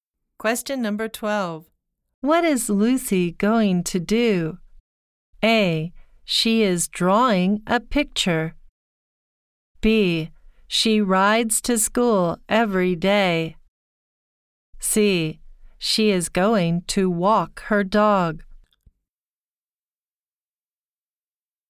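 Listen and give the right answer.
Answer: C: She is going to walk her dog.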